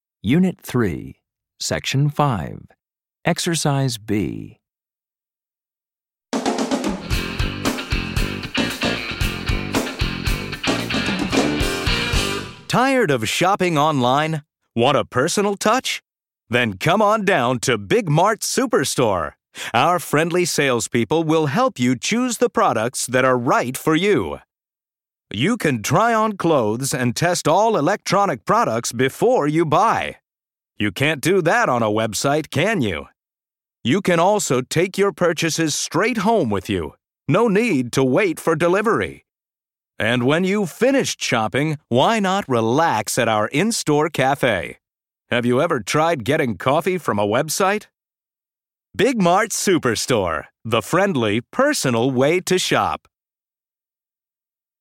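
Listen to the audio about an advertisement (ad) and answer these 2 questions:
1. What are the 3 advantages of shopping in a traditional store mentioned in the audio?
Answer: Friendly salespeople help you choose products; you can try on clothes and test electronic products before buying; you can take purchases straight home without waiting for delivery (also an in-store cafe).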